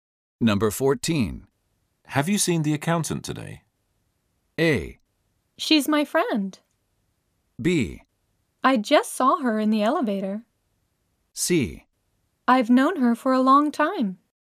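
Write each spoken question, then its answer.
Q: Have you seen the accountant today?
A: B: I just saw her in the elevator.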